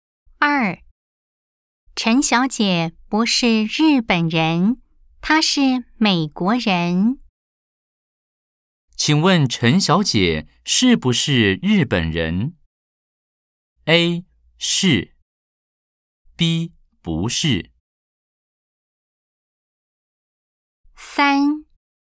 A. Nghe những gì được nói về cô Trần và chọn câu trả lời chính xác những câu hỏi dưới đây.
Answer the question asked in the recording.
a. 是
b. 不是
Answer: b. 不是

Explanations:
陳小姐不是日本人,她是美國人。